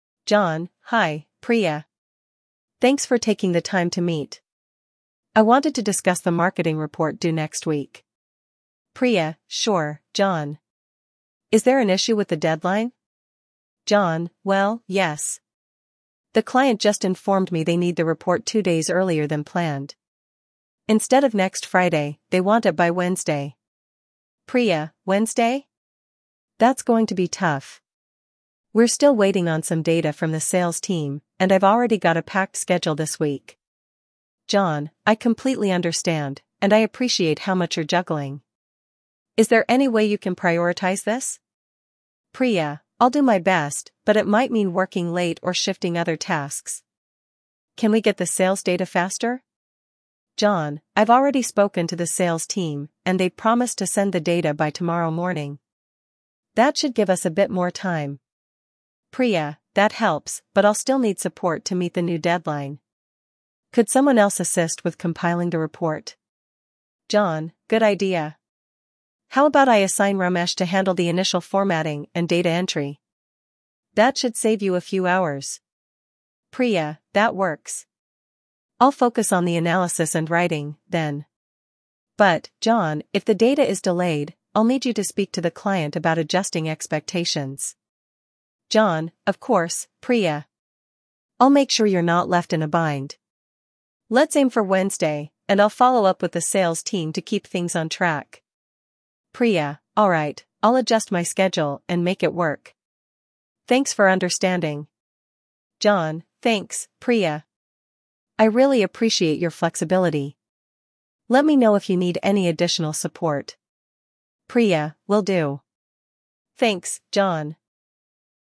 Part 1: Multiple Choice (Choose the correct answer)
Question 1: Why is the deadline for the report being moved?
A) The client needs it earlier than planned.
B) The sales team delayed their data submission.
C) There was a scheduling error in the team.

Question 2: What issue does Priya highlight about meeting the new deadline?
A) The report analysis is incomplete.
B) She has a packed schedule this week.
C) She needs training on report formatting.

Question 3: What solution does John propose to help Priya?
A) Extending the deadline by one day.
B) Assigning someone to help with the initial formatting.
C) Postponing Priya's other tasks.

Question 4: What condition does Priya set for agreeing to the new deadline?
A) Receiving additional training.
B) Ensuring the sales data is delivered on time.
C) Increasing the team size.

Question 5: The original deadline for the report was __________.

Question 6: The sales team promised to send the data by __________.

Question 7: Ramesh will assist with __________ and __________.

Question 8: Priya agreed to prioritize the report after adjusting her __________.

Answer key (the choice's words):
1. The client needs it earlier than planned.
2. She has a packed schedule this week.
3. Assigning someone to help with the initial formatting.
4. Ensuring the sales data is delivered on time.
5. next Friday
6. tomorrow morning
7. formatting; data entry
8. schedule

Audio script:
John: Hi, Priya. Thanks for taking the time to meet. I wanted to discuss the marketing report due next week.
Priya: Sure, John. Is there an issue with the deadline?
John: Well, yes. The client just informed me they need the report two days earlier than planned. Instead of next Friday, they want it by Wednesday.
Priya: Wednesday? That's going to be tough. We're still waiting on some data from the sales team, and I've already got a packed schedule this week.
John: I completely understand, and I appreciate how much you're juggling. Is there any way you can prioritize this?
Priya: I'll do my best, but it might mean working late or shifting other tasks. Can we get the sales data faster?
John: I've already spoken to the sales team, and they've promised to send the data by tomorrow morning. That should give us a bit more time.
Priya: That helps, but I'll still need support to meet the new deadline. Could someone else assist with compiling the report?
John: Good idea. How about I assign Ramesh to handle the initial formatting and data entry? That should save you a few hours.
Priya: That works. I'll focus on the analysis and writing, then. But, John, if the data is delayed, I'll need you to speak to the client about adjusting expectations.
John: Of course, Priya. I'll make sure you're not left in a bind. Let's aim for Wednesday, and I'll follow up with the sales team to keep things on track.
Priya: Alright, I'll adjust my schedule and make it work. Thanks for understanding.
John: Thanks, Priya. I really appreciate your flexibility. Let me know if you need any additional support.
Priya: Will do. Thanks, John.